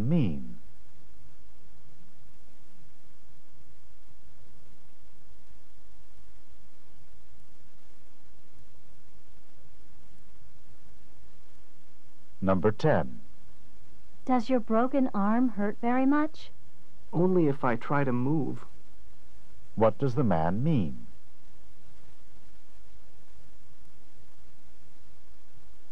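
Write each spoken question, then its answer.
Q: What does the man mean?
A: It hurts only when he moves it.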